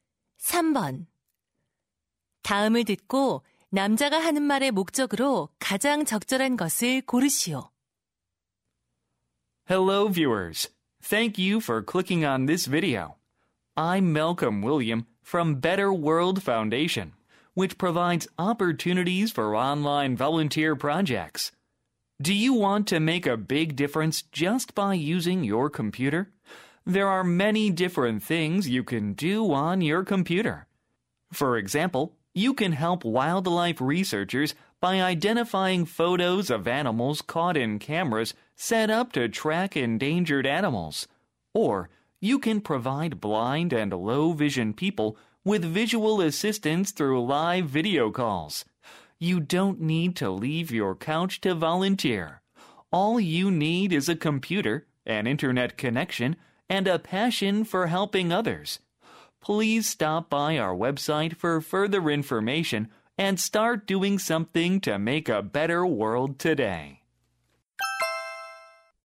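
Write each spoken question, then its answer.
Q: 다음을 듣고 남자가 하는 말의 목적으로 가장 적절한 것을 고르시오.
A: 온라인 자원봉사 참여를 독려하려고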